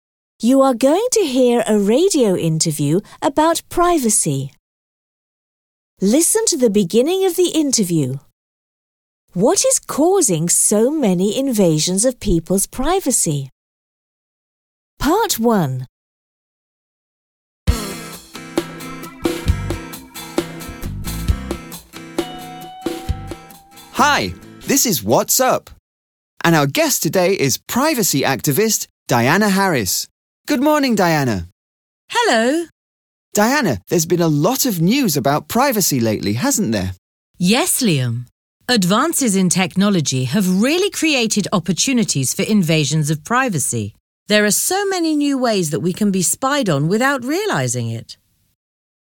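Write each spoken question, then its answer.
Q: What is causing so many invasions of people's privacy?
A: Advances in technology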